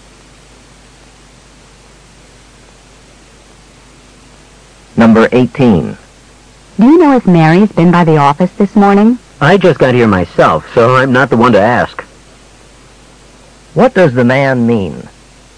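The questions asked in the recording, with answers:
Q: What does the man mean?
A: He doesn't know; he just arrived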